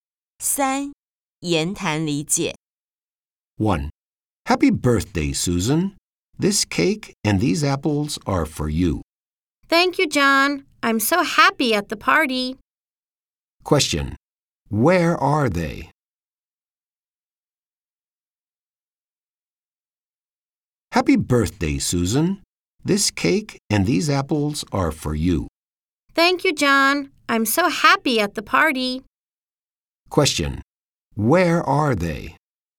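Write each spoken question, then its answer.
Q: Where are they?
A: At the party.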